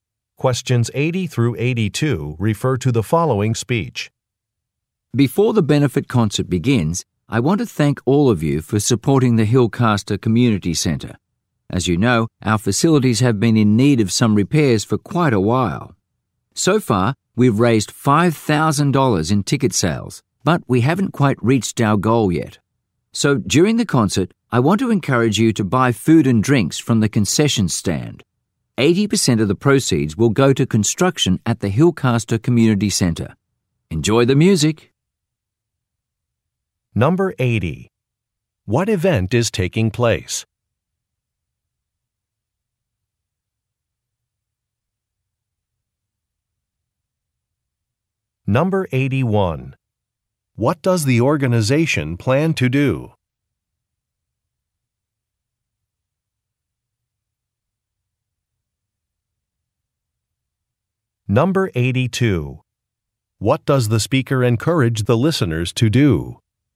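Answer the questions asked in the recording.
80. A benefit concert
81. Repair the community centre
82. Buy food and drinks from the concession stand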